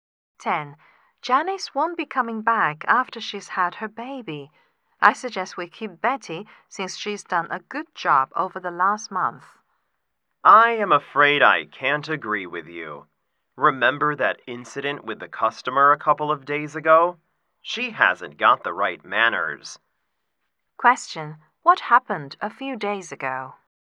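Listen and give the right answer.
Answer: Betty was rude to a customer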